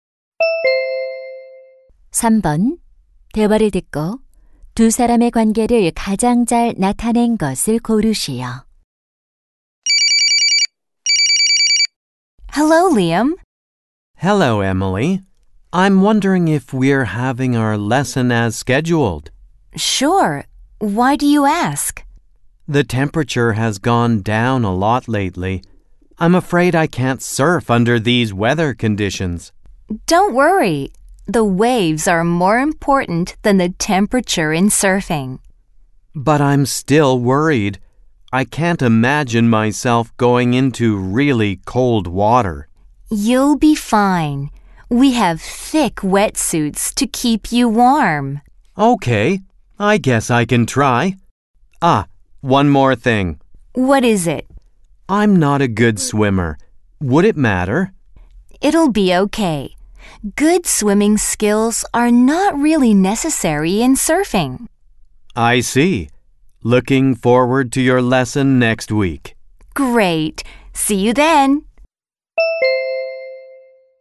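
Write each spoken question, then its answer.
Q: 대화를 듣고 두 사람의 관계를 가장 잘 나타낸 것을 고르시오.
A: 서핑 강사와 수강생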